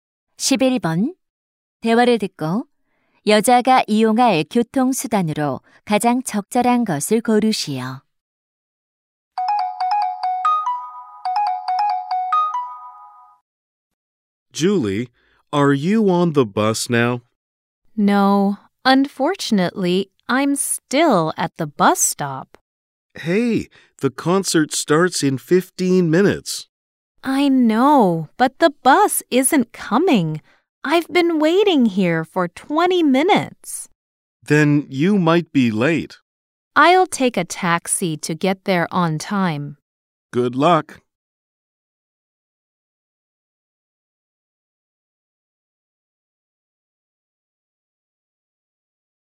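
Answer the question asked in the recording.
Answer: 택시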